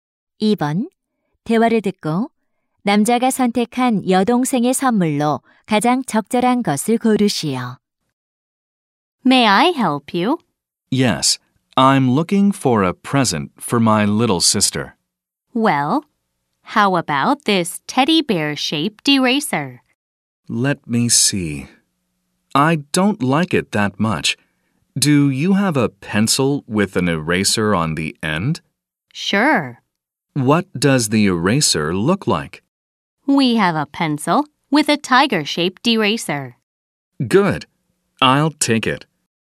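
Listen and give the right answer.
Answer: 호랑이 모양 지우개가 달린 연필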